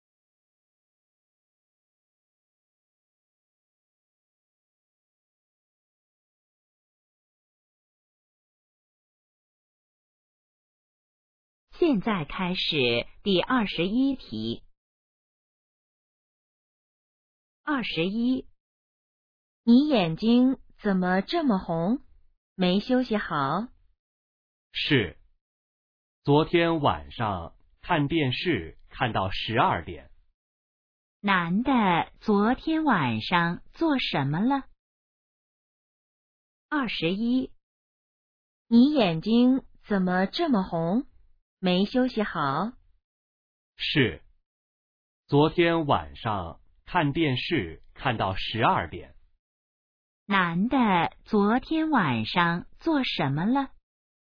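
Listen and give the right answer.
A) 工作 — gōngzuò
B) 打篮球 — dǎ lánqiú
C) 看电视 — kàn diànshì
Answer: C) 看电视 — kàn diànshì

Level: HSK2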